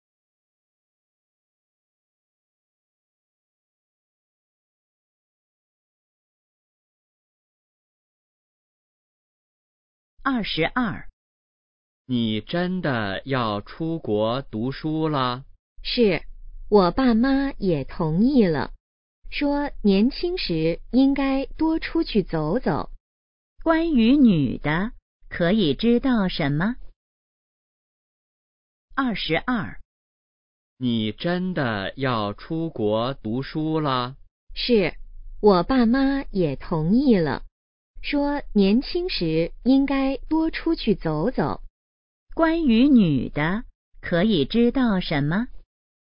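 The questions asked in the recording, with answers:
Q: 关于女的,可以知道什么?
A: 她要出国读书了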